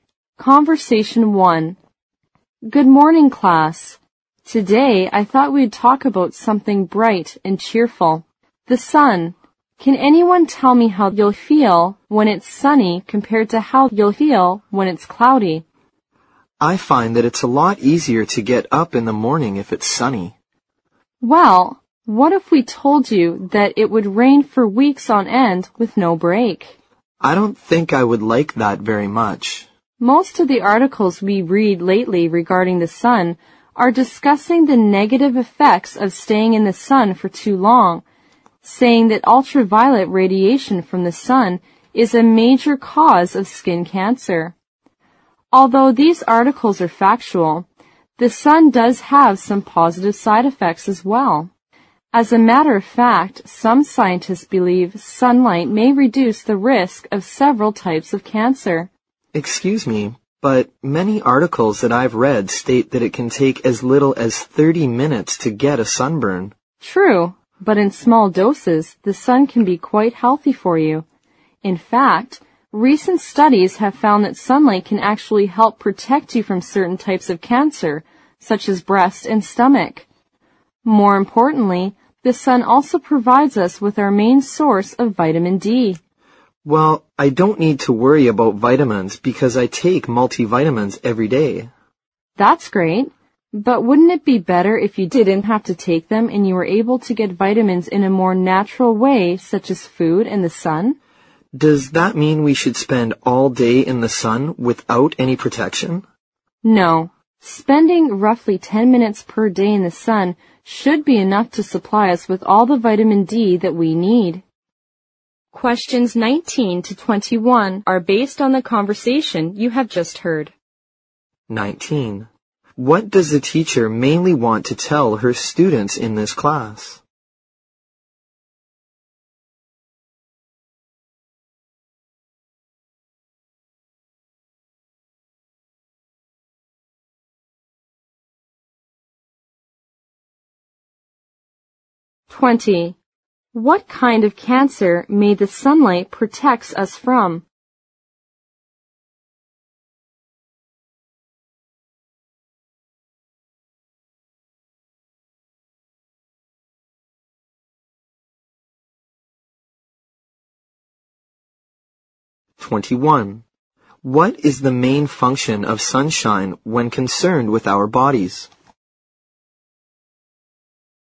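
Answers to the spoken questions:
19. The sun has positive effects on health as well as negative ones.
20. Breast and stomach cancer
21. It is our main source of vitamin D.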